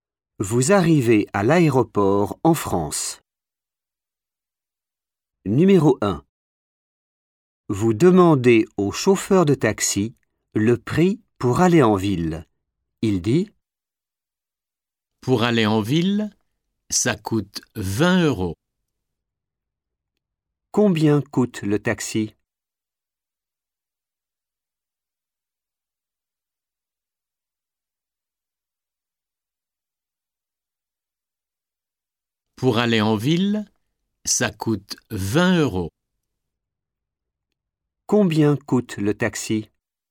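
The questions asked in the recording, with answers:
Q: Combien coûte le taxi?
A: 20 euros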